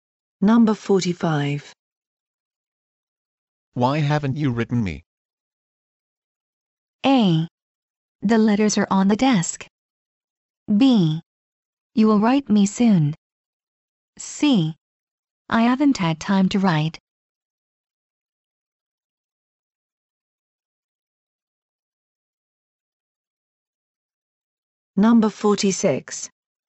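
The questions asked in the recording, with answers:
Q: Why haven't you written me?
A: C: I haven't had time to write.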